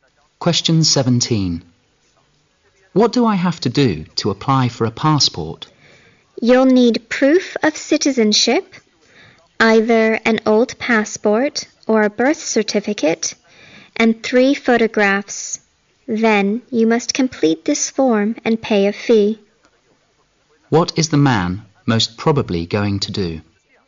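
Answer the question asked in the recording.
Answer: Apply for a passport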